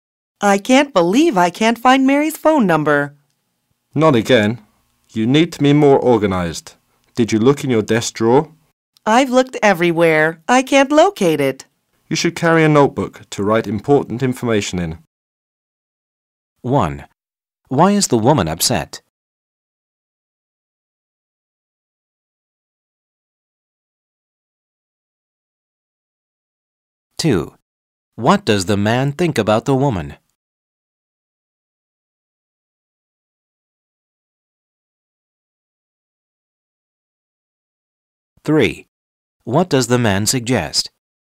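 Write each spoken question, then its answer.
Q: Why is the woman upset?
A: She can't find Mary's phone number

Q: What does the man think about the woman?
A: She needs to be more organized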